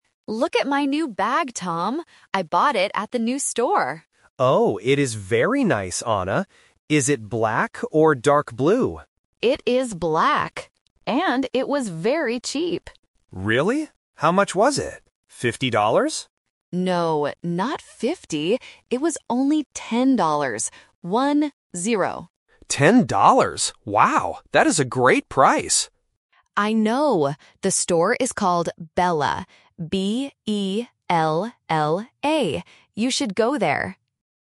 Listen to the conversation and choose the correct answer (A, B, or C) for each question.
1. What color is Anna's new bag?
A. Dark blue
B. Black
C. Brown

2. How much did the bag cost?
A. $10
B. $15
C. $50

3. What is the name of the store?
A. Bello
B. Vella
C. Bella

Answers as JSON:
{"1": "B", "2": "A", "3": "C"}

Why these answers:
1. Tom asks if the bag is black or dark blue (The Trap). Anna clearly answers, "It is black" (The Key). Brown is not mentioned in the audio.
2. Tom guesses that the bag costs fifty dollars (The Trap). Anna corrects him and says, "It was only ten dollars! One, zero" (The Key). $15 sounds similar to 50, but it is not the correct number.
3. Anna explicitly spells out the name of the store letter by letter: "B-E-L-L-A" (The Key). The other options have similar sounds to trick the listener.

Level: A1

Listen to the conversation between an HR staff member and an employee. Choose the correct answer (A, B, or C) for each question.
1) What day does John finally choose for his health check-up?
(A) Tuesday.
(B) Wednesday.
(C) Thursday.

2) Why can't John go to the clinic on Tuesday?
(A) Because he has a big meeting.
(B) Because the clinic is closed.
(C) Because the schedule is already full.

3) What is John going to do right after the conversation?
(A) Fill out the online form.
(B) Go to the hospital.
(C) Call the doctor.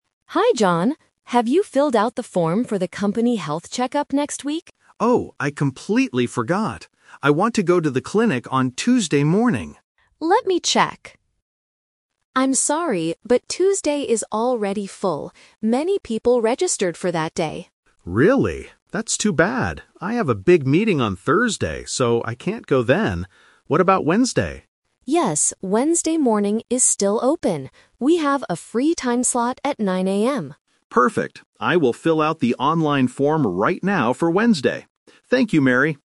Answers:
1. B
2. C
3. A

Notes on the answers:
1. At the end of the conversation, John agrees and says, "I will fill out the online form right now for Wednesday." Option (A) is a trap; Tuesday was his first choice, but it was full. Option (C) is also a trap; Thursday is mentioned, but he rejected it because of a meeting.
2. Mary tells him, "I'm sorry, but Tuesday is already full." Option (A) is a trap; he has a big meeting on Thursday, not Tuesday. Option (B) is a plausible reason for not going to a clinic, but it is not mentioned in the audio.
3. John clearly states, "I will fill out the online form right now." Option (B) is a trap; he is going to the clinic next week, not right now. Option (C) is plausible but not mentioned.

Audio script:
Mary (HR): Hi John. Have you filled out the form for the company health check-up next week?
John: Oh, I completely forgot! I want to go to the clinic on Tuesday morning.
Mary: Let me check... I'm sorry, but Tuesday is already full. Many people registered for that day.
John: Really? That's too bad. I have a big meeting on Thursday, so I can't go then. What about Wednesday?
Mary: Yes, Wednesday morning is still open. We have a free time slot at 9:00 AM.
John: Perfect. I will fill out the online form right now for Wednesday. Thank you, Mary!

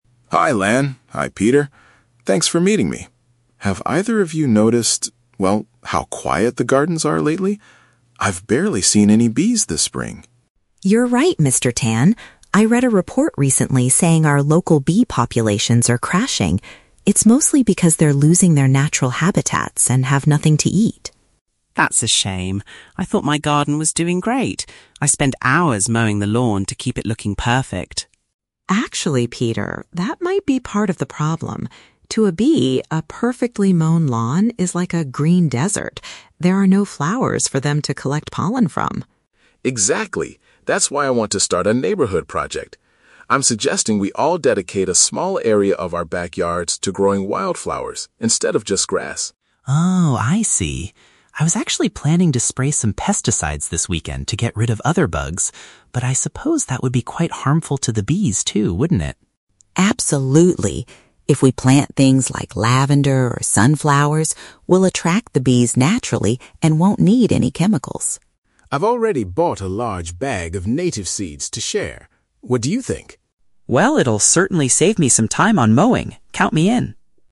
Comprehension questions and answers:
Listen to the conversation between the three neighbors and choose the best answer (A, B, or C) for each question.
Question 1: What is the primary reason Mr. Tan wants to start a neighborhood group?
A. To help neighbors compete for the best-looking lawn.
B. To address the declining number of bees in the area.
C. To share the cost of expensive gardening tools.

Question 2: Why does Ms. Lan refer to a "perfect lawn" as a "green desert"?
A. Because it requires too much water to stay healthy.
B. Because it provides no food resources for bees.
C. Because the grass turns brown and dry during the summer.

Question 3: What is the group's final plan to help the bees?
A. They will use safer pesticides to protect the flowers.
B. They will only plant lavender in their front yards.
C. They will grow native wildflowers and stop using chemicals.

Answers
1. B
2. B
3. C

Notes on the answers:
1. Mr. Tan starts the talk by mentioning he's "barely seen any bees" and suggests a project to help them.
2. Ms. Lan explains that in a perfect lawn, there are "no flowers for them to collect pollen from." In B1 level, "food resources" is a paraphrase for "flowers/pollen."
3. The conversation concludes with planting "wildflowers" and Peter agreeing to "stop spraying" (no chemicals).

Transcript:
Mr. Tan: Hi Lan, hi Peter. Thanks for meeting me. Have either of you noticed... well, how quiet the gardens are lately? I've barely seen any bees this spring.
Lan: You're right, Mr. Tan. I read a report recently saying our local bee populations are crashing. It's mostly because they're losing their natural habitats and have nothing to eat.
Peter: That's a shame. I thought my garden was doing great—I spend hours mowing the lawn to keep it looking perfect.
Lan: Actually, Peter, that might be part of the problem. To a bee, a perfectly mown lawn is like a "green desert." There are no flowers for them to collect pollen from.
Mr. Tan: Exactly. That's why I want to start a neighborhood project. I'm suggesting we all dedicate a small area of our backyards to growing wildflowers instead of just grass.
Peter: Oh, I see. I was actually planning to spray some pesticides this weekend to get rid of other bugs, but I suppose that would be quite harmful to the bees too, wouldn't it?
Lan: Absolutely. If we plant things like lavender or sunflowers, we'll attract the bees naturally and won't need any chemicals.
Mr. Tan: I've already bought a large bag of native seeds to share. What do you think?
Peter: Well, it'll certainly save me some time on mowing! Count me in.

